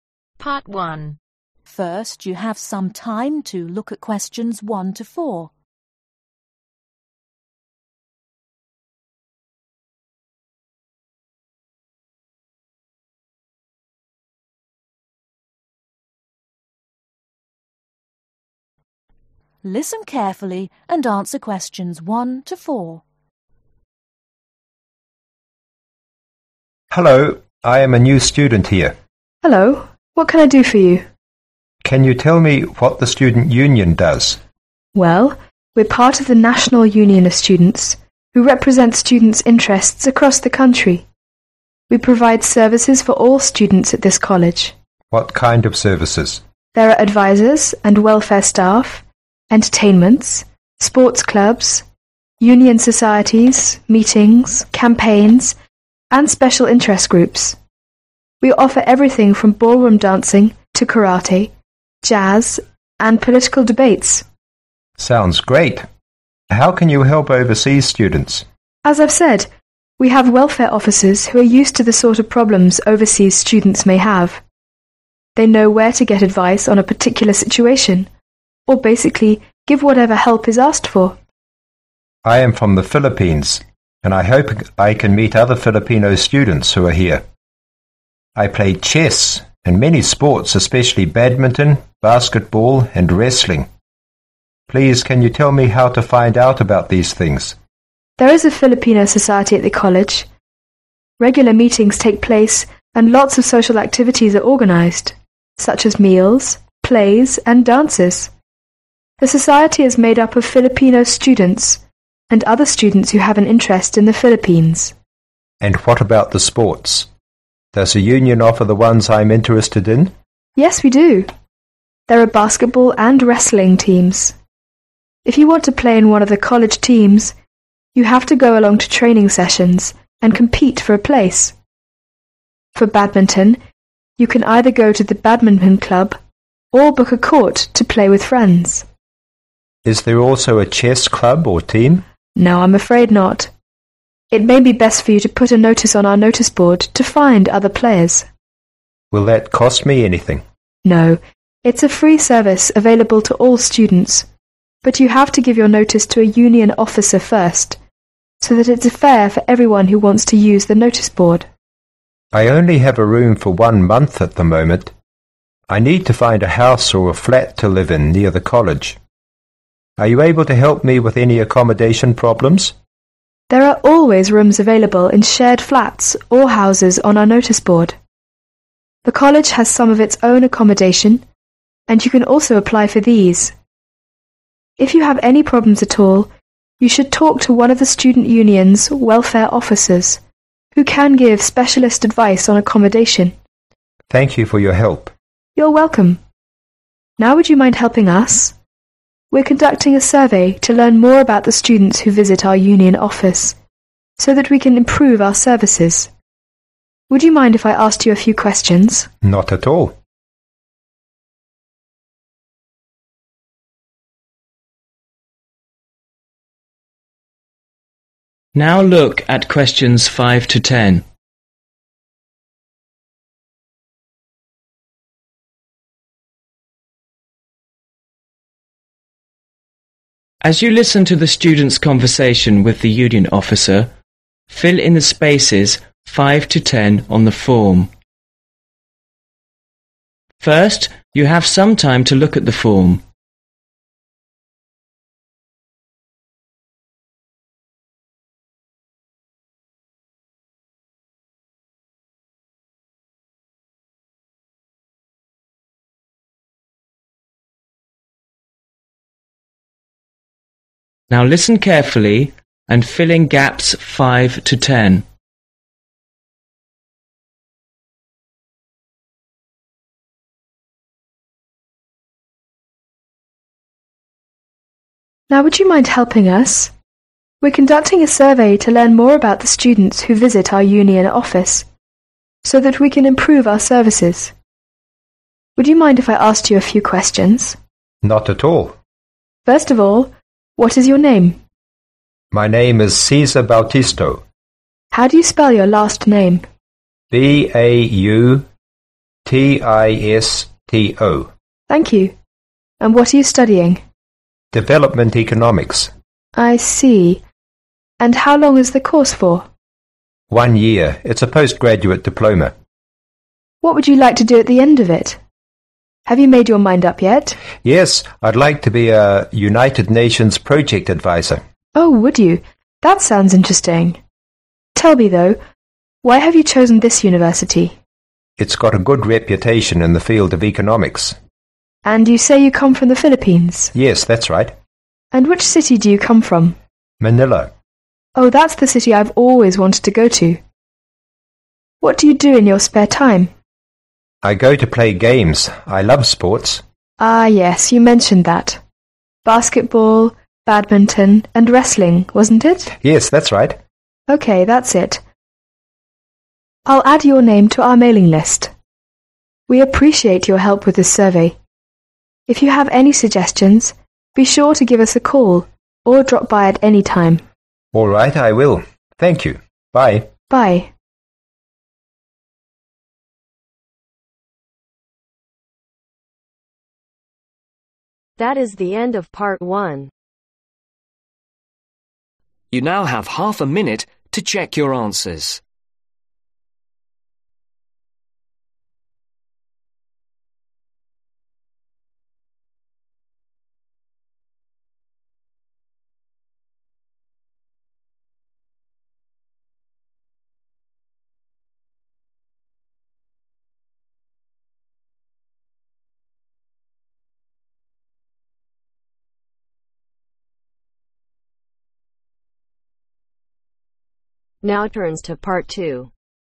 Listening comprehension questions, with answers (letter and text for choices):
Circle the correct letter.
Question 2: Which office helps overseas students with their particular problems ?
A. Sports club.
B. Union Societies.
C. Welfare Office.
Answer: C. Welfare Office.

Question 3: What kind of sports doesn't the student mention ?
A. Basketball Team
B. Badminton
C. Racing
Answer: C. Racing

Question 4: Where can the Filipion students find his compatriots at the school ?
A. Training Sessions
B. Filipion Society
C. Badminton Court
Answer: B. Filipion Society

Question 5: Surname (5)............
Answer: Bautisto

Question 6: Subject (6)............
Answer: Development Economics

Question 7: Length of the course (7)............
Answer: One year

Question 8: Job in the future UN Project (8)............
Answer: Adviser

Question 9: this university (9)............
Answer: Good reputation

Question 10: Major Interest (10)...........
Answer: Love sports /sports